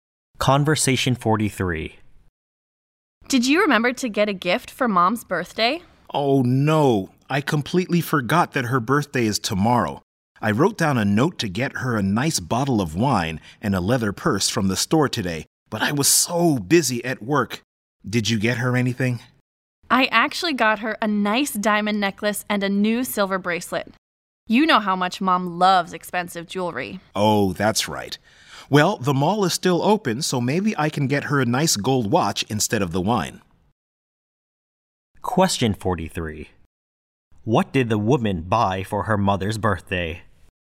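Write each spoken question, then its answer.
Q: What did the woman buy for her mother's birthday?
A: A diamond necklace and a silver bracelet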